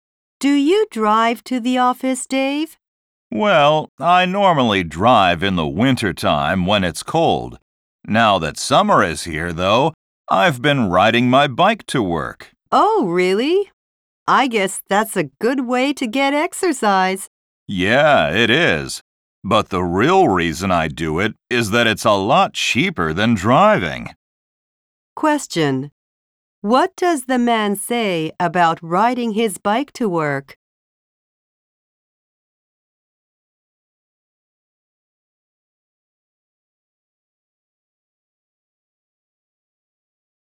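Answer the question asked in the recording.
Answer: It is a lot cheaper than driving.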